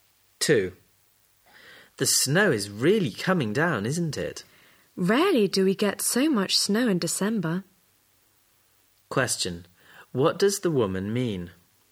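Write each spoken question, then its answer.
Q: What does the woman mean?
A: It seldom snows so heavily in December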